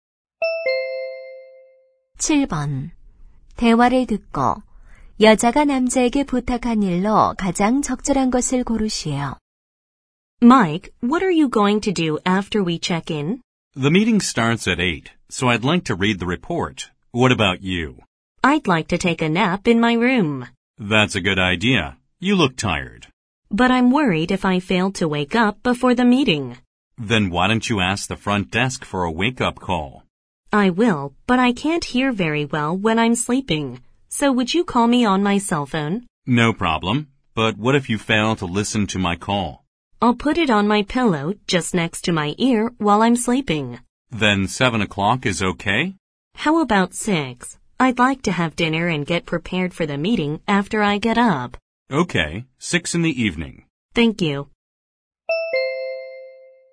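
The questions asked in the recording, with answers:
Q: 대화를 듣고 여자가 남자에게 부탁한 일로 가장 적절한 것을 고르시오.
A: 6시에 휴대전화로 깨워 주기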